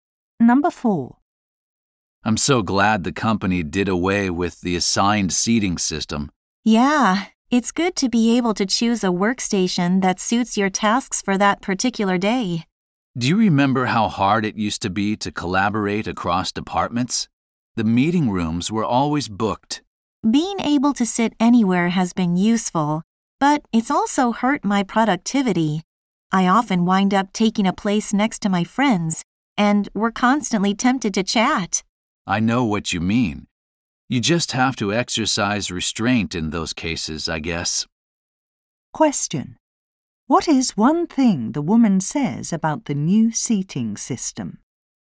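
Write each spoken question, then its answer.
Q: What is one thing the woman says about the new seating system?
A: It has hurt her productivity because she chats with friends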